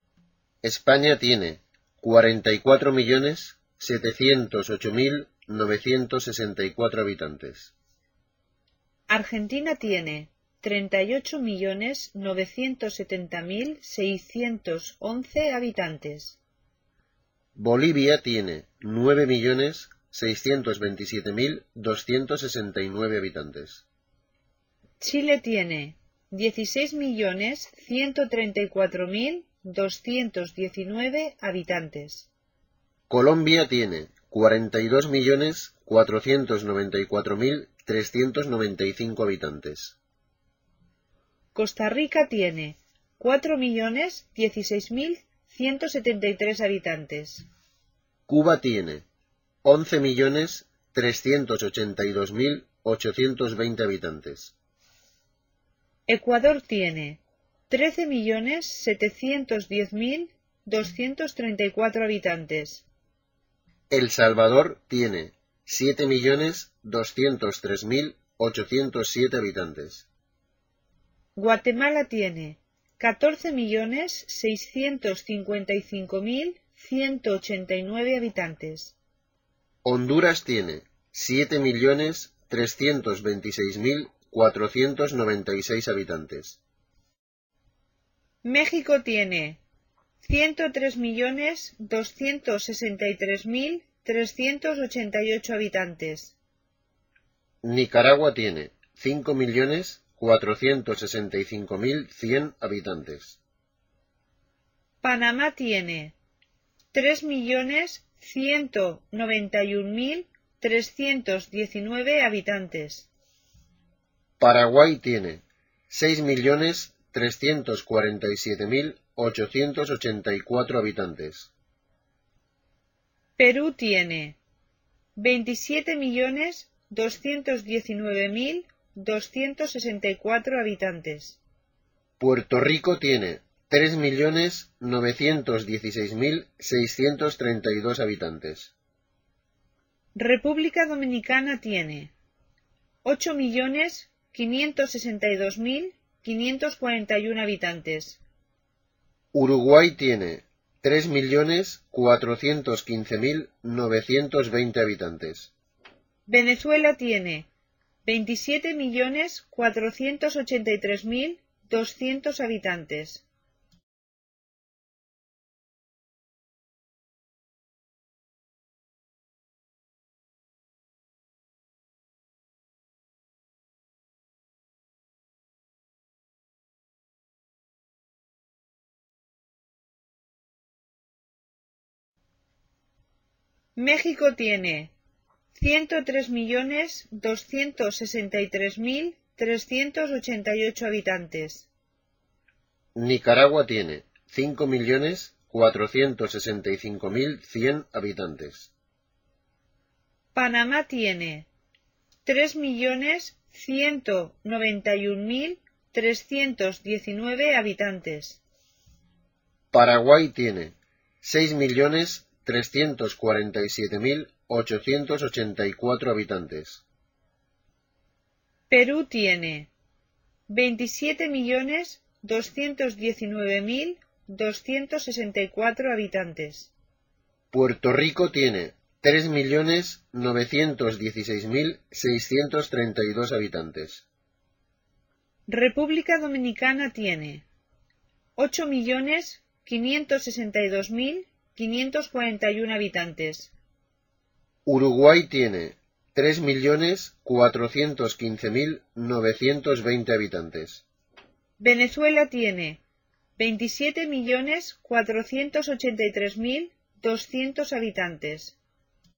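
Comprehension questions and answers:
Listen and write the number of inhabitants of some Spanish speaking countries. Follow the example.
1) España tiene habitantes.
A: 44.708.964

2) Argentina tiene habitantes.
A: 38.970.611

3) Bolivia tiene habitantes.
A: 9.627.269

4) Chile tiene habitantes.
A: 16.134.219

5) Colombia tiene habitantes.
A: 42.494.395

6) Costa Rica tiene habitantes.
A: 4.016.173

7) Cuba tiene habitantes.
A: 11.382.820

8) Ecuador tiene habitantes.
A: 13.710.234

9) El Salvador tiene habitantes.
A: 7.203.807

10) Guatemala tiene habitantes.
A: 14.655.189

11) Honduras tiene habitantes.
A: 7.326.496

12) México tiene habitantes.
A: 103.263.388

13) Nicaragua tiene habitantes.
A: 5.465.100

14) Panamá tiene habitantes.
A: 3.191.319

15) Paraguay tiene habitantes.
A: 6.347.884

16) Perú tiene habitantes.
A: 27.219.264

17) Puerto Rico tiene habitantes.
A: 3.916.632

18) República Dominicana tiene habitantes.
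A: 8.562.541

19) Uruguay tiene habitantes.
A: 3.415.920

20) Venezuela tiene habitantes.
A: 27.483.200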